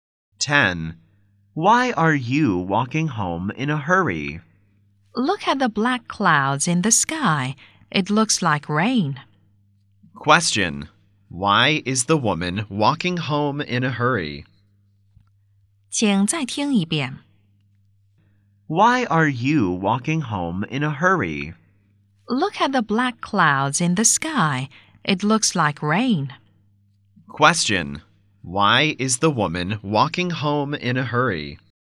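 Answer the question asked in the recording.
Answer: It looks like rain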